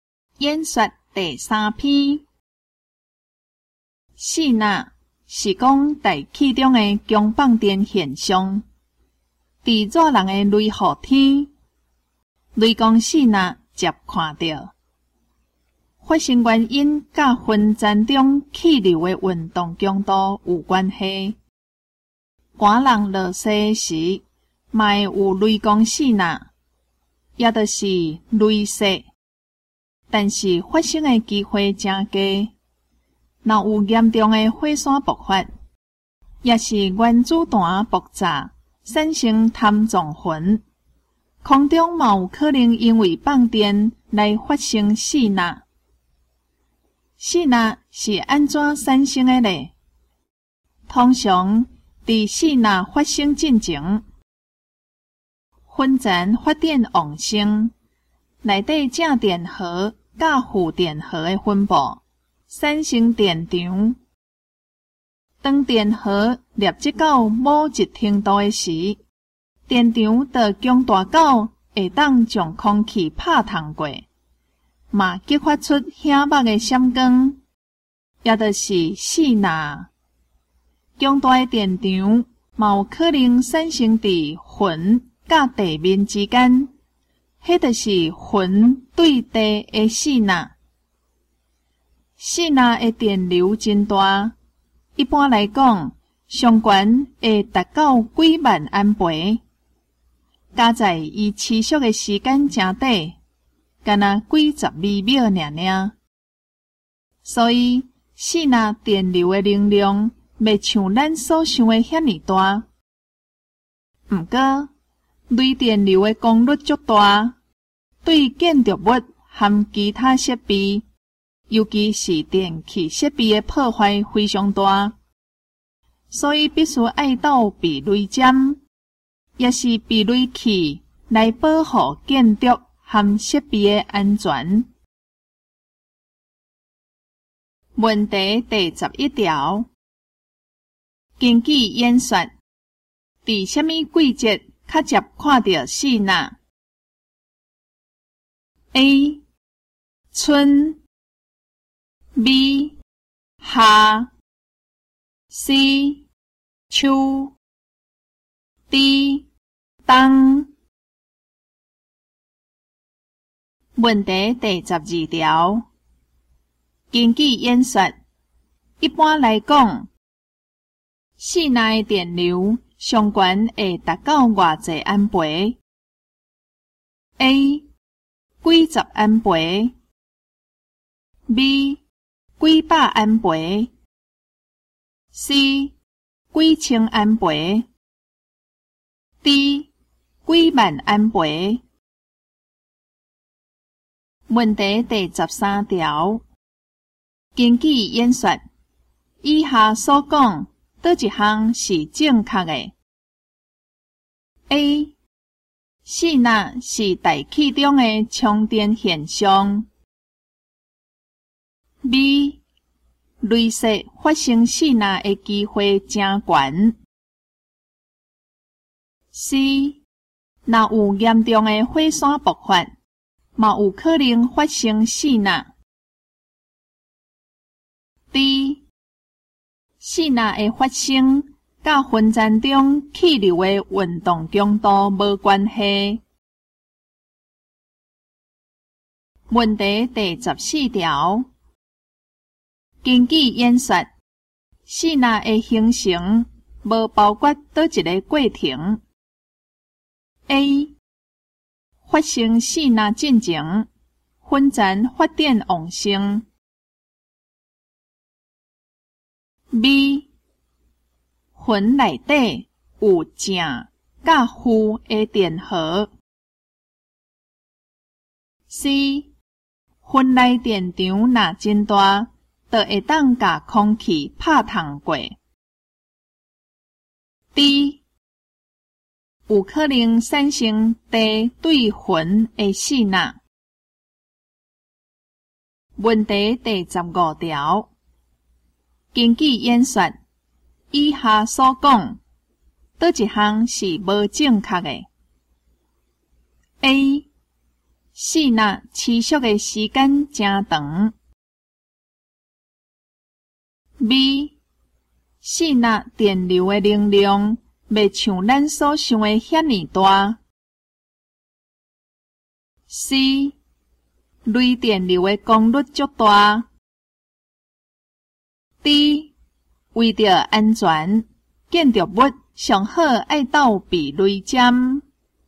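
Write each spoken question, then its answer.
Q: 根据演说,在什么季节较接看到四纳 ?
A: B: 夏

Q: 根据演说,一般来讲,四纳的电流上悬会达到偌济安培 ?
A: D: 几万安培

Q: 根据演说,以下所讲哪一项是正确的 ?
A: C: 若有严重的火山爆发,也有可能发生四纳

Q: 根据演说,四纳的形成无包括倒一个过程。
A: D: 有可能产生地对云的四纳

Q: 根据演说,以下所讲哪一项是无正确的 ?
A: A: 四纳持续的时间真长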